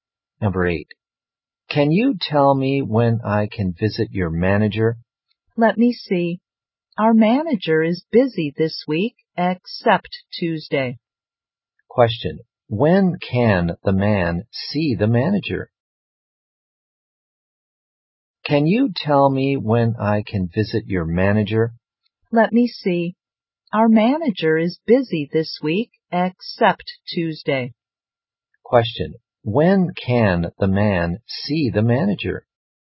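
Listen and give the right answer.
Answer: On Tuesday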